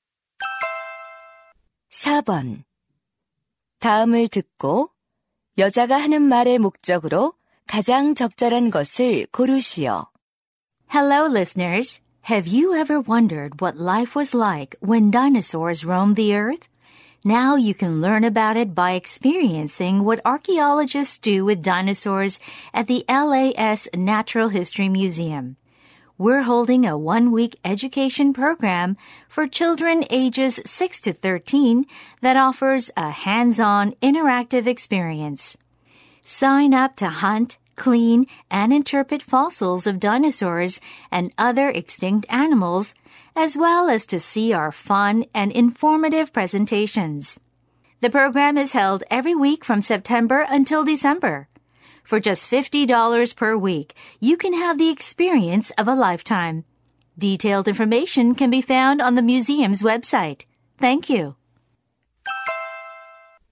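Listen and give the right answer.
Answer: 어린이 공룡 교육 프로그램 홍보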